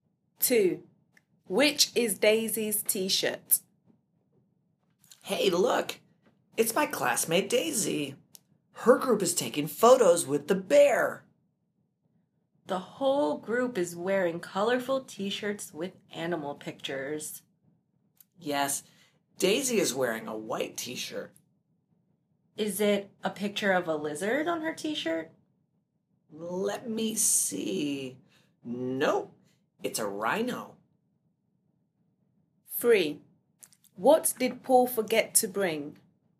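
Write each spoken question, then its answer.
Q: Which is Daisy's t-shirt?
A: A white t-shirt with a rhino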